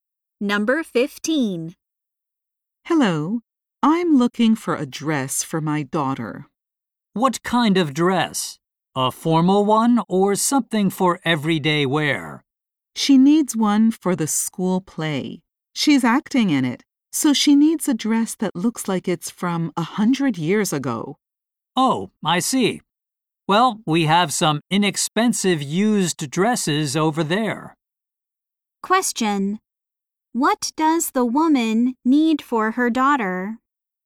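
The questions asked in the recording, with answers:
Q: What does the woman need for her daughter?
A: A dress that looks 100 years old, for the school play.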